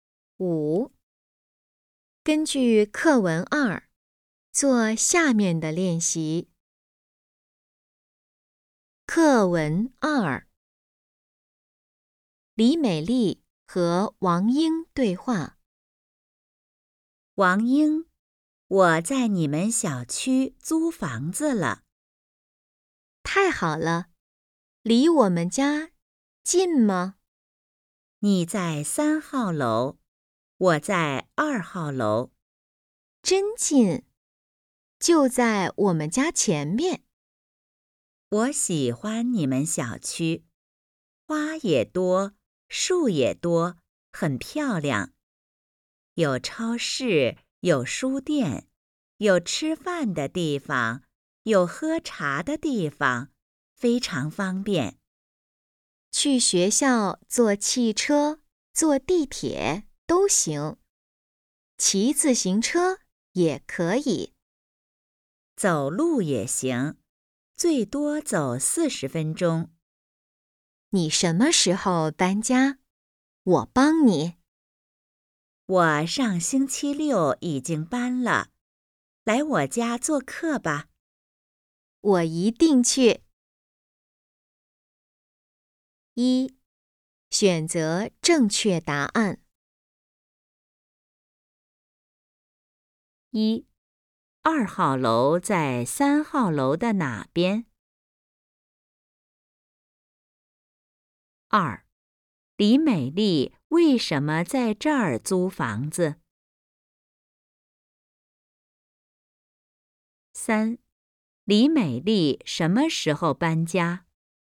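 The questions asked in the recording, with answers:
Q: 李美丽为什么在这儿租房子?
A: 她喜欢这个小区,很漂亮,也非常方便

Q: 李美丽什么时候搬家?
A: 上星期六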